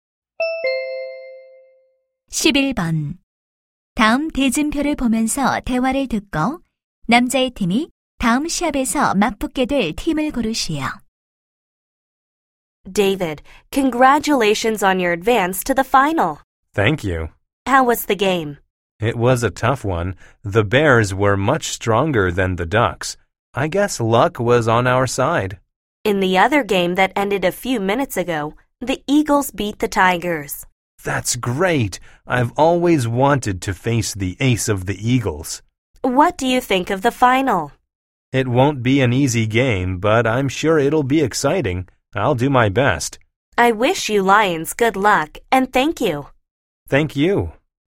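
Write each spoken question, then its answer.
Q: 다음 대진표를 보면서 대화를 듣고 남자의 팀이 다음 시합에서 맞붙게 될 팀을 고르시오.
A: Eagles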